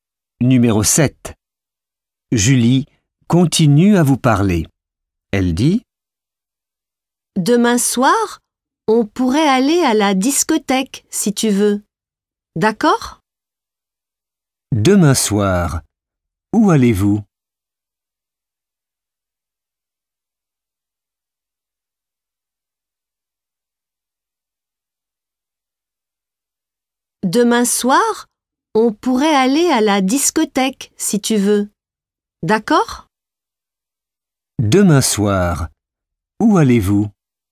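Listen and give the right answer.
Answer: À la discothèque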